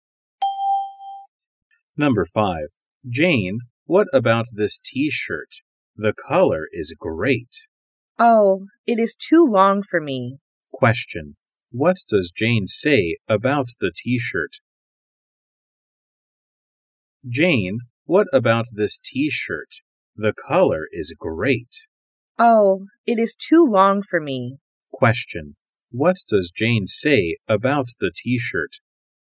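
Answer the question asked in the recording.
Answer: It is too long for her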